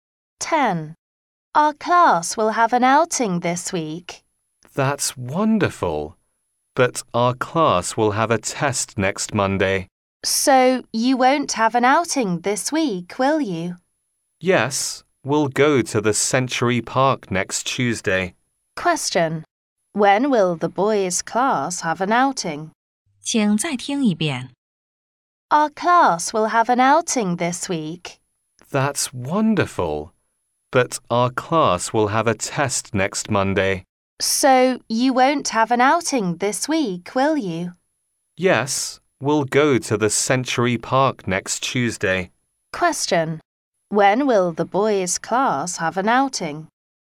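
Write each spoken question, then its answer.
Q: When will the boys' class have an outing?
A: Next Tuesday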